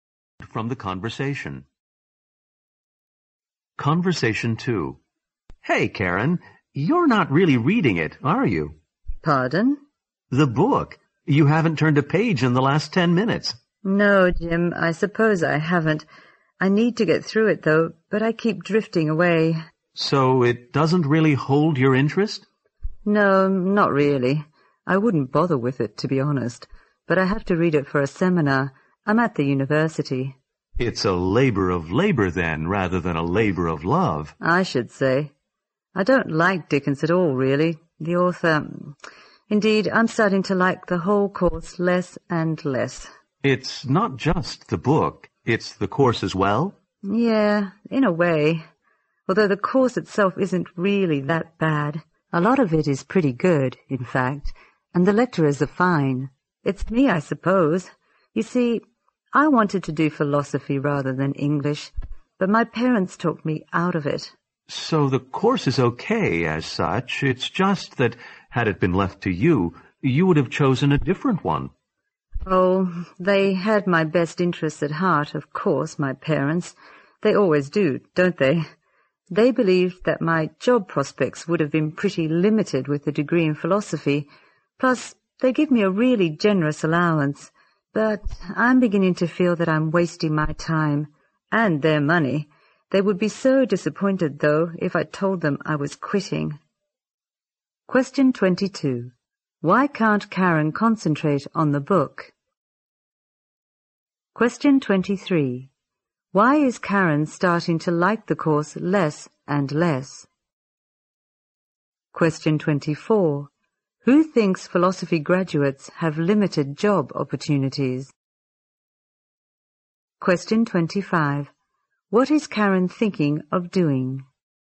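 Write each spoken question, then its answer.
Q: Why can't Karen concentrate on the book?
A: It doesn't hold her interest; she doesn't like Dickens.

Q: Why is Karen starting to like the course less and less?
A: She wanted to study philosophy, not English, but her parents talked her out of it.

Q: Who thinks philosophy graduates have limited job opportunities?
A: Karen's parents.

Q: What is Karen thinking of doing?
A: Quitting the course.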